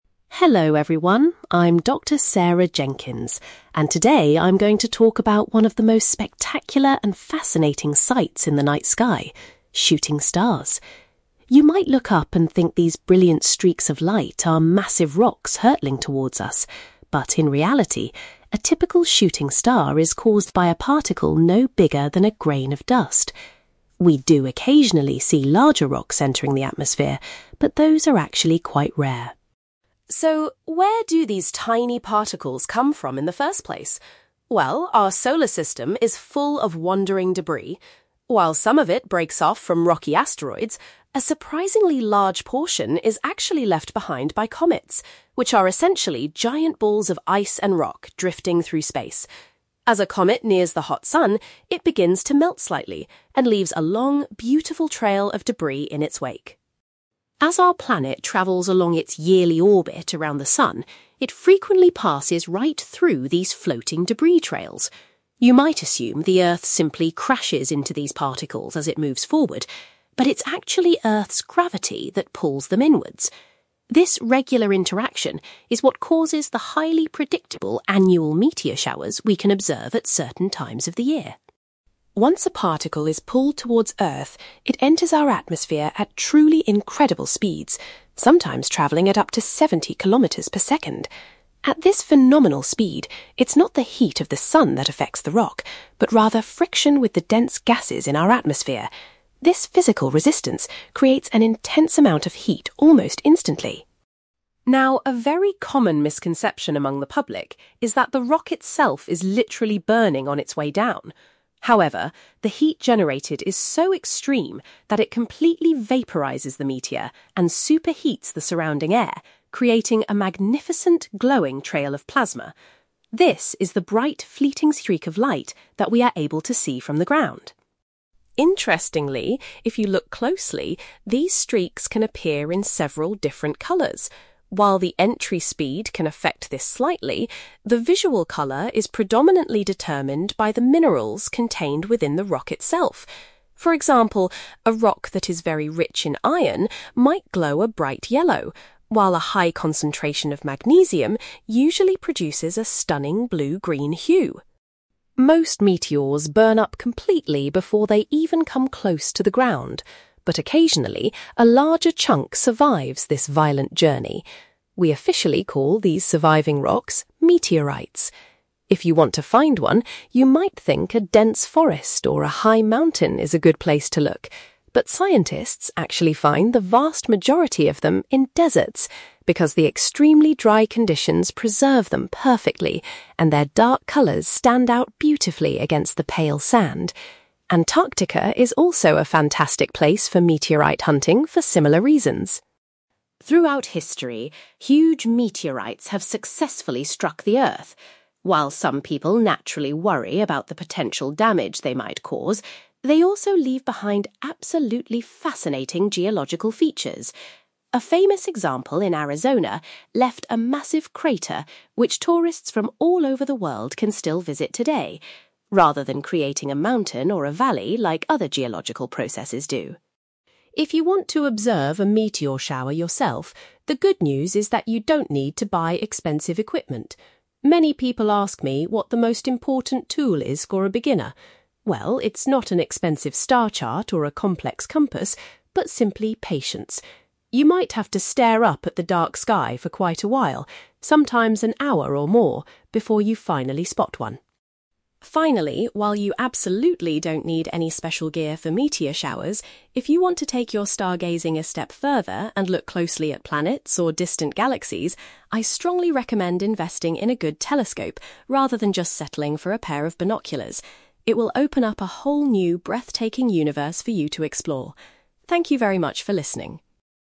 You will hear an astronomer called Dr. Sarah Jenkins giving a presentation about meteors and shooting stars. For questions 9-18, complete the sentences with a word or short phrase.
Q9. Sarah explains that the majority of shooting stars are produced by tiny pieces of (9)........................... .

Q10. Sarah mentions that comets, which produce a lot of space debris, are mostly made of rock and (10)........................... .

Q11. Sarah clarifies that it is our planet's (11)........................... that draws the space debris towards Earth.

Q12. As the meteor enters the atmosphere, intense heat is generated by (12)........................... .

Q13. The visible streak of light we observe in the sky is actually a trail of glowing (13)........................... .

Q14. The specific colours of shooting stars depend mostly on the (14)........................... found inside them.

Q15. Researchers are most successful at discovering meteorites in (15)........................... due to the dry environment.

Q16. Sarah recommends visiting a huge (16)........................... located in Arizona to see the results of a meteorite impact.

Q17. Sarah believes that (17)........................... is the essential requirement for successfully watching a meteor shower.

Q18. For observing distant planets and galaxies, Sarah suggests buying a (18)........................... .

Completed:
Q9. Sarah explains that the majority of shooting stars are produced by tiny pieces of dust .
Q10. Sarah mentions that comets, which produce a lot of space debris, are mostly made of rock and ice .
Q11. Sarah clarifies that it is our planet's gravity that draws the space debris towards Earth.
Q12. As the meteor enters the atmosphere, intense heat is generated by friction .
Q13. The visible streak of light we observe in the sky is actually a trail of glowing plasma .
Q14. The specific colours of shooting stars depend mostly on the minerals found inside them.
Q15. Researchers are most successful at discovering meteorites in deserts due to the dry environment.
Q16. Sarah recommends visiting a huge crater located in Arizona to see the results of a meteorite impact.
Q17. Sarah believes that patience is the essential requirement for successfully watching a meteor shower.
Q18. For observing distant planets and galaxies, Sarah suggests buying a telescope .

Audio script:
Dr. Sarah Jenkins: Hello everyone, I'm Dr. Sarah Jenkins, and today I'm going to talk about one of the most spectacular and fascinating sights in the night sky: shooting stars. You might look up and think these brilliant streaks of light are massive rocks hurtling towards us, but in reality, a typical shooting star is caused by a particle no bigger than a grain of dust. We do occasionally see larger rocks entering the atmosphere, but those are actually quite rare.
So, where do these tiny particles come from in the first place? Well, our solar system is full of wandering debris. While some of it breaks off from rocky asteroids, a surprisingly large portion is actually left behind by comets, which are essentially giant balls of ice and rock drifting through space. As a comet nears the hot sun, it begins to melt slightly and leaves a long, beautiful trail of debris in its wake.
As our planet travels along its yearly orbit around the sun, it frequently passes right through these floating debris trails. You might assume the Earth simply crashes into these particles as it moves forward, but it's actually Earth's gravity that pulls them inwards. This regular interaction is what causes the highly predictable annual meteor showers we can observe at certain times of the year.
Once a particle is pulled towards Earth, it enters our atmosphere at truly incredible speeds—sometimes travelling at up to seventy kilometers per second! At this phenomenal speed, it's not the heat of the sun that affects the rock, but rather friction with the dense gases in our atmosphere. This physical resistance creates an intense amount of heat almost instantly.
Now, a very common misconception among the public is that the rock itself is literally burning on its way down. However, the heat generated is so extreme that it completely vaporizes the meteor and superheats the surrounding air, creating a magnificent, glowing trail of plasma. This is the bright, fleeting streak of light that we are able to see from the ground.
Interestingly, if you look closely, these streaks can appear in several different colours. While the entry speed can affect this slightly, the visual colour is predominantly determined by the minerals contained within the rock itself. For example, a rock that is very rich in iron might glow a bright yellow, while a high concentration of magnesium usually produces a stunning blue-green hue.
Most meteors burn up completely before they even come close to the ground. But occasionally, a larger chunk survives this violent journey. We officially call these surviving rocks 'meteorites'. If you want to find one, you might think a dense forest or a high mountain is a good place to look, but scientists actually find the vast majority of them in deserts, because the extremely dry conditions preserve them perfectly, and their dark colours stand out beautifully against the pale sand. Antarctica is also a fantastic place for meteorite hunting for similar reasons.
Throughout history, huge meteorites have successfully struck the Earth. While some people naturally worry about the potential damage they might cause, they also leave behind absolutely fascinating geological features. A famous example in Arizona left a massive crater which tourists from all over the world can still visit today, rather than creating a mountain or a valley like other geological processes do.
If you want to observe a meteor shower yourself, the good news is that you don't need to buy expensive equipment. Many people ask me what the most important tool is for a beginner. Well, it's not an expensive star chart or a complex compass, but simply patience. You might have to stare up at the dark sky for quite a while, sometimes an hour or more, before you finally spot one.
Finally, while you absolutely don't need any special gear for meteor showers, if you want to take your stargazing a step further and look closely at planets or distant galaxies, I strongly recommend investing in a good telescope rather than just settling for a pair of binoculars. It will open up a whole new, breathtaking universe for you to explore. Thank you very much for listening.

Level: B2